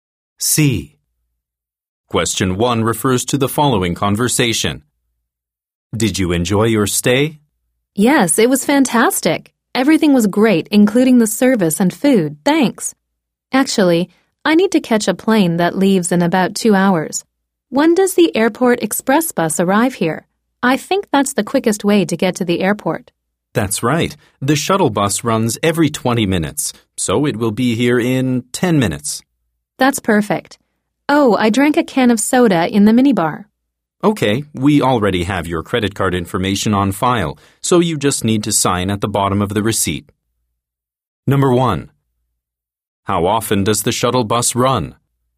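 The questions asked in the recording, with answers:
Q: How often does the shuttle bus run?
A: Every 20 minutes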